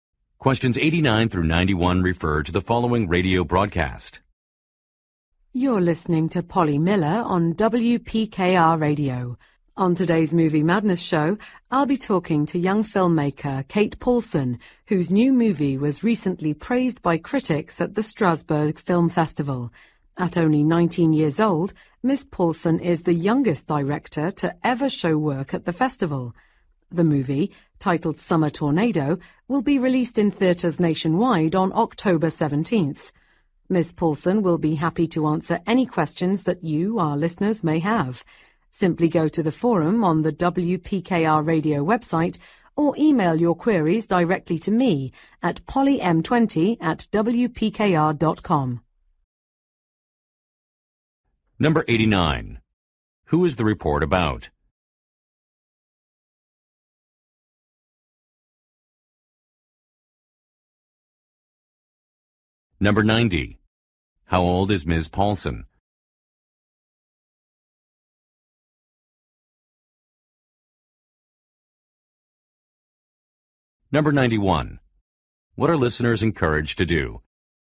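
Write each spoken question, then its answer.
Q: Who is the report about?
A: Young filmmaker Kate Paulson

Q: How old is Ms. Paulson?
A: 19

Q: What are listeners encouraged to do?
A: Send questions through the website forum or by email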